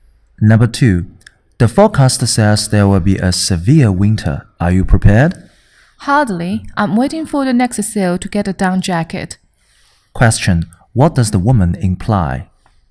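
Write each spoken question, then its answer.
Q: What does the woman imply?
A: She isn't prepared yet; she's waiting for a sale to buy a down jacket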